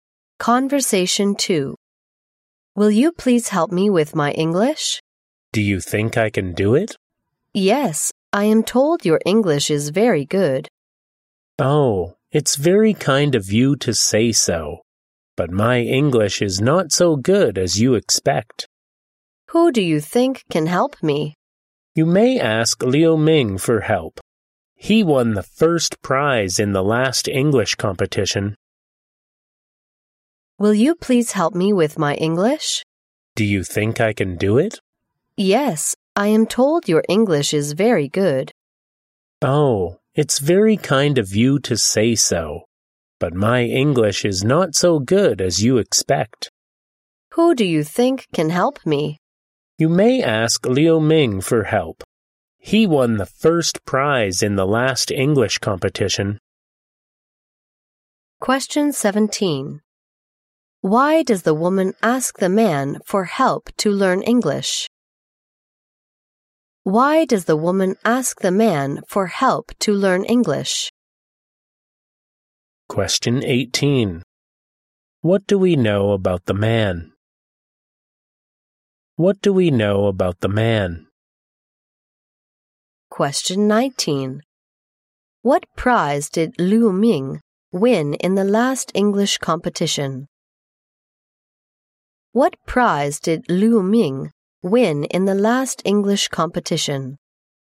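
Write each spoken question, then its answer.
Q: Why does the woman ask the man for help to learn English?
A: She was told his English is very good

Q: What prize did Liu Ming win in the last English competition?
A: The first prize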